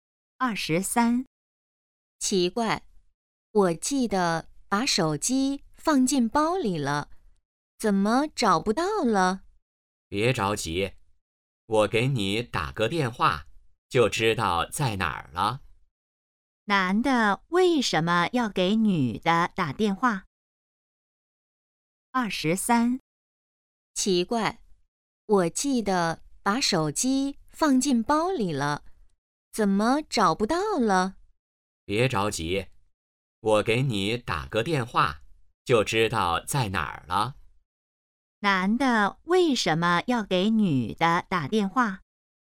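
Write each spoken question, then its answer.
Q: 男的为什么要给女的打电话?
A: 帮她找手机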